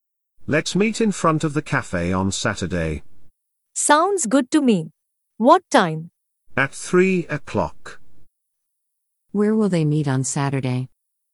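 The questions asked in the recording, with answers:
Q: Where will they meet on Saturday?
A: In front of the cafe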